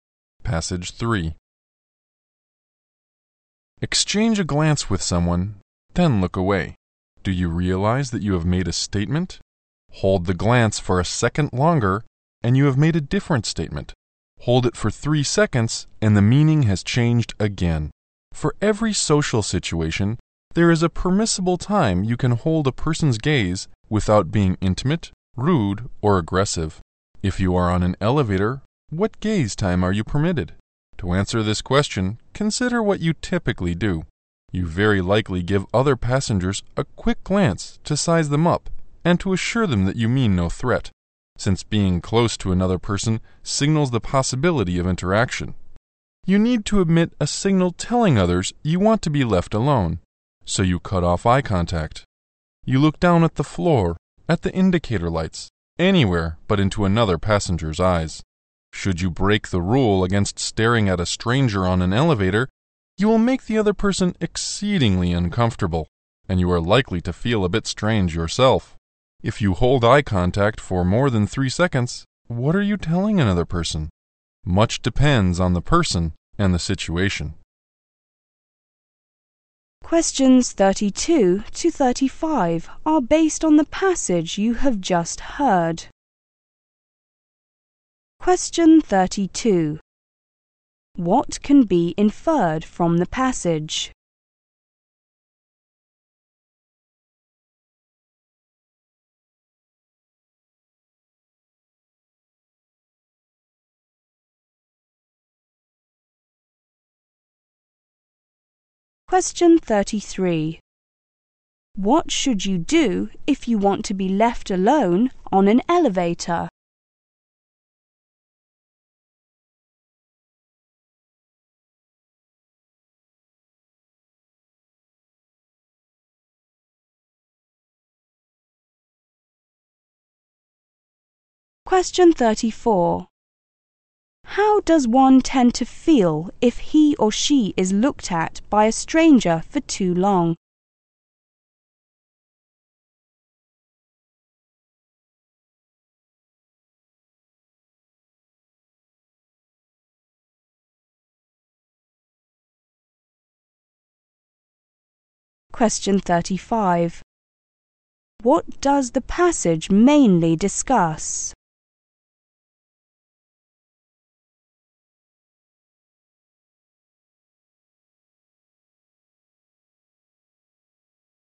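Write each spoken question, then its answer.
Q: What should you do if you want to be left alone on an elevator?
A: Cut off eye contact.

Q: How does one tend to feel if he or she is looked at by a stranger for too long?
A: Very uncomfortable.

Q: What does the passage mainly discuss?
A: How long you can hold someone's gaze (eye contact) in social situations.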